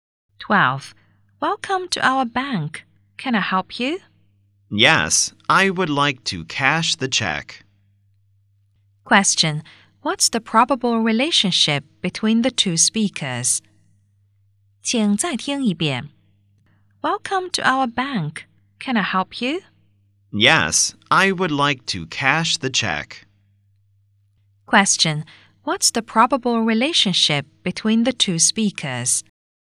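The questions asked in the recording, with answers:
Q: What's the probable relationship between the two speakers?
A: Bank clerk and customer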